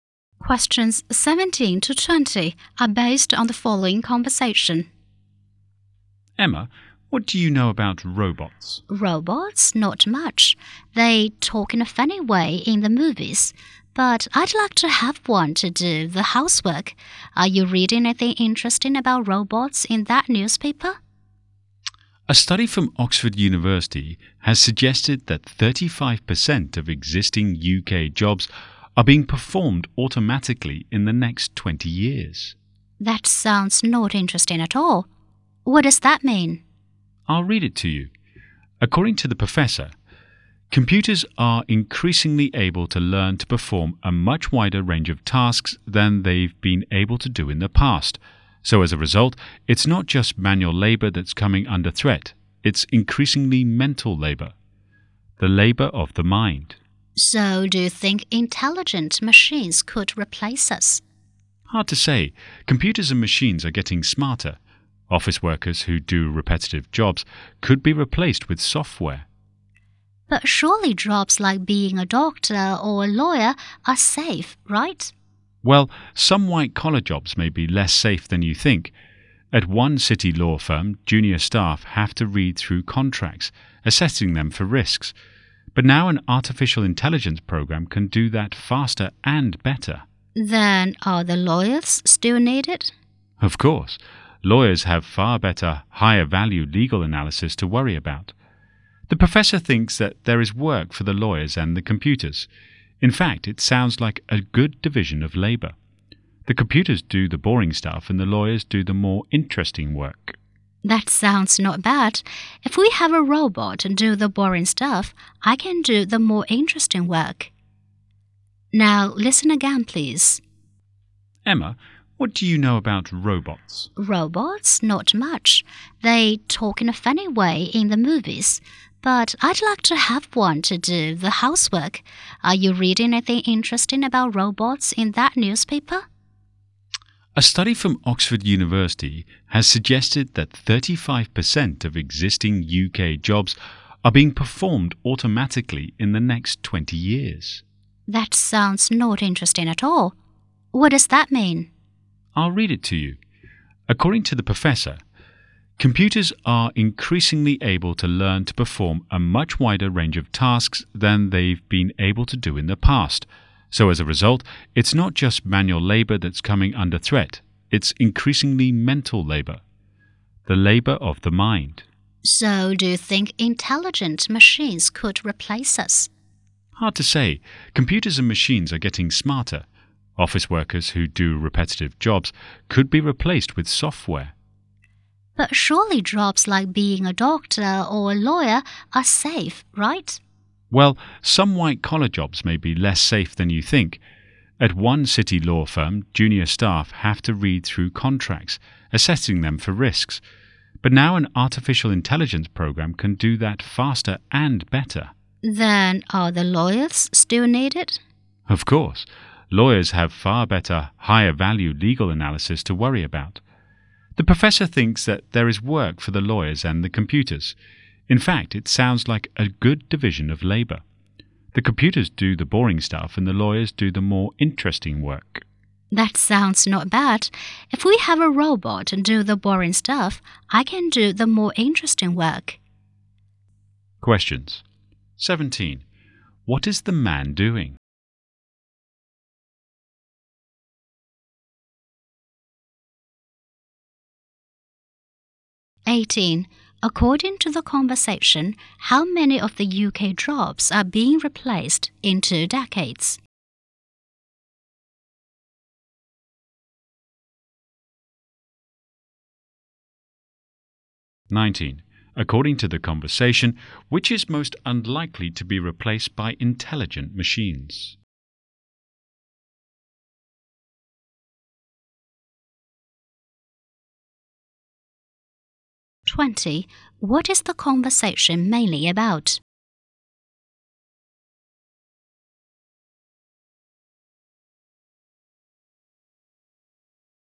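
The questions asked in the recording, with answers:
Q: What is the man doing?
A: Reading a newspaper

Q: According to the conversation, how many of the UK jobs are being replaced in 2 decades?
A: 35%

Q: What is the conversation mainly about?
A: Robots and intelligent machines replacing human jobs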